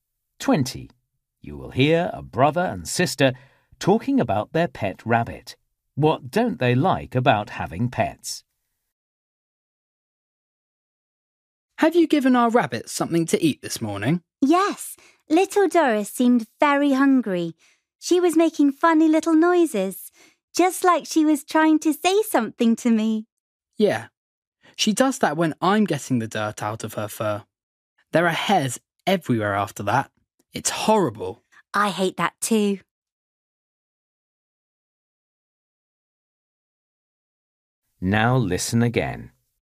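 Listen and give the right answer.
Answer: The hairs everywhere after cleaning their fur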